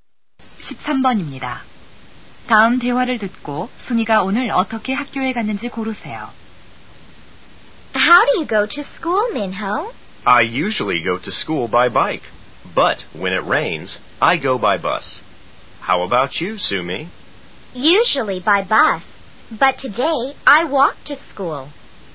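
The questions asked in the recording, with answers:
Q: 다음 대화를 듣고 순이가 오늘 어떻게 학교에 갔는지 고르세요.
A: 걸어서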